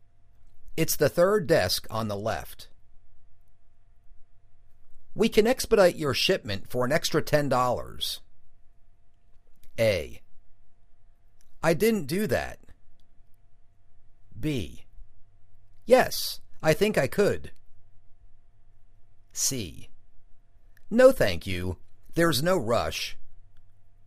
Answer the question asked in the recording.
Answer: No thank you. There's no rush.